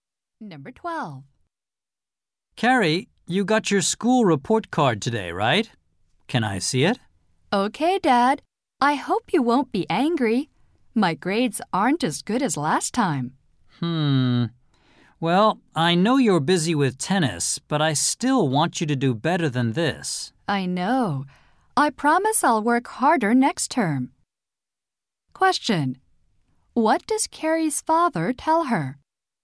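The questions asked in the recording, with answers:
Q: Question. What does Carrie's father tell her?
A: He wants her to get better grades.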